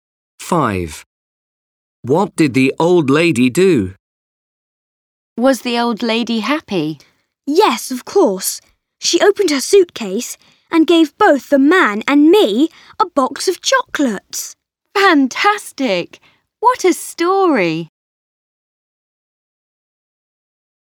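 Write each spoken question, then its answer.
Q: What did the old lady do?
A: She gave the man and Max a box of chocolates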